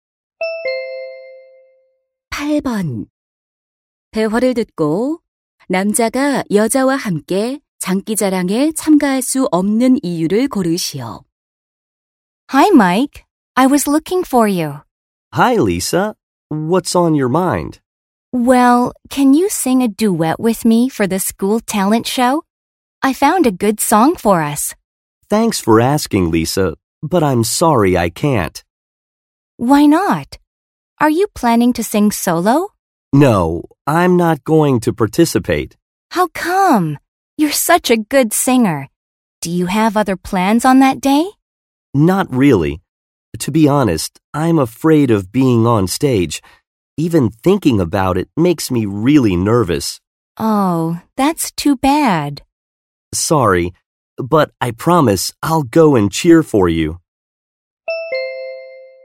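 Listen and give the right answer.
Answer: 무대에 서는 것이 두려워서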